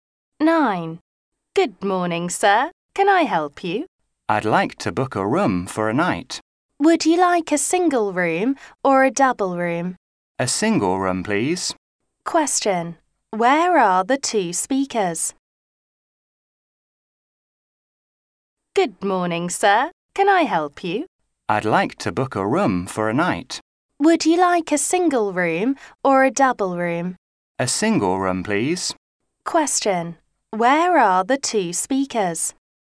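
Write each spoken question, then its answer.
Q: Where are the two speakers?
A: In a hotel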